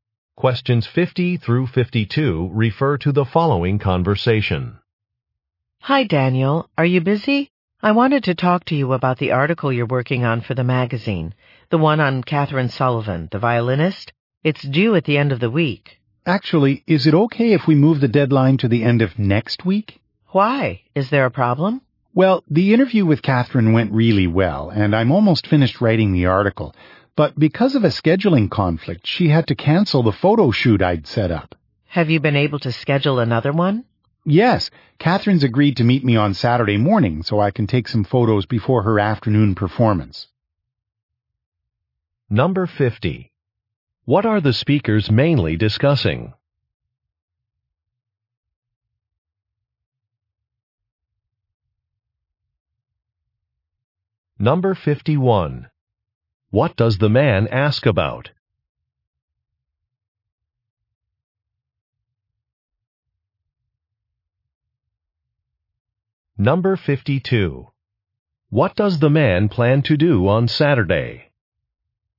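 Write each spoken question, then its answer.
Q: What are the speakers mainly discussing?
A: A magazine article about a violinist

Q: What does the man ask about?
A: Moving the deadline to the end of next week

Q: What does the man plan to do on Saturday?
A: Take photos of Catherine Sullivan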